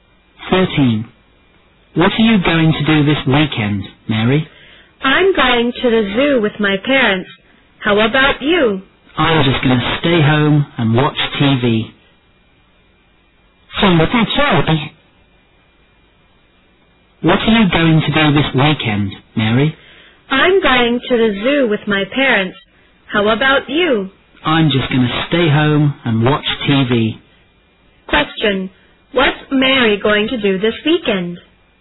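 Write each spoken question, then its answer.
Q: What's Mary going to do this weekend?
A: Go to the zoo with her parents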